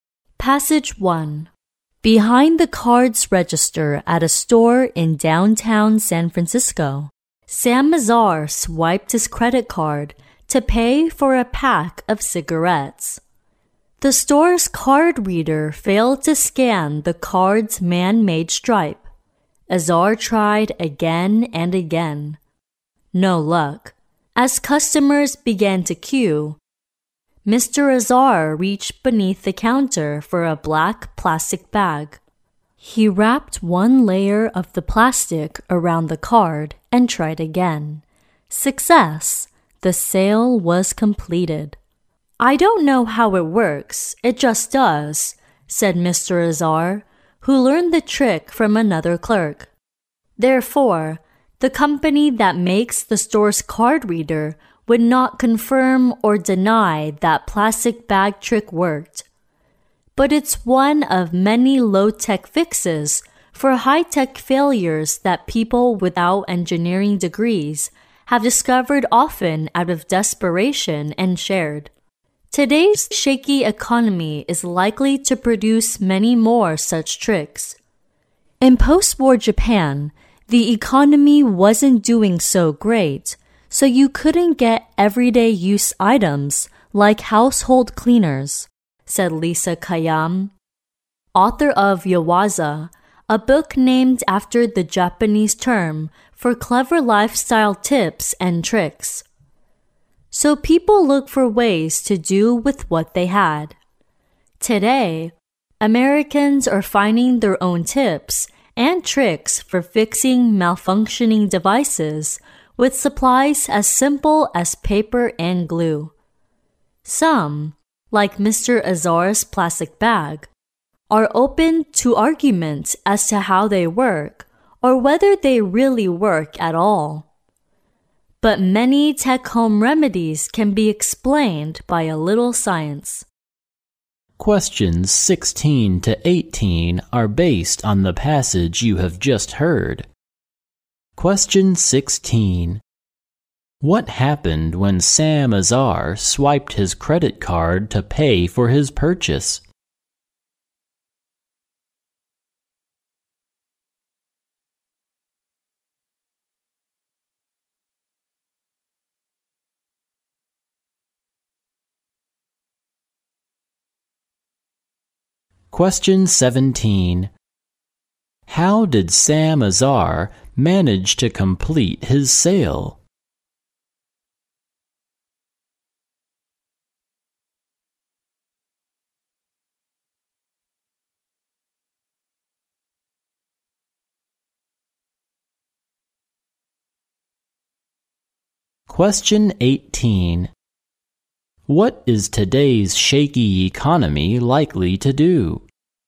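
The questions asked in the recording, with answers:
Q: What happened when Sam Azar swiped his credit card to pay for his purchase?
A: The card reader failed to scan the card

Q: How did Sam Azar manage to complete his sale?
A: By wrapping the card in a layer of plastic bag

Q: What is today's shaky economy likely to do?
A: Produce more low-tech tricks for fixing high-tech failures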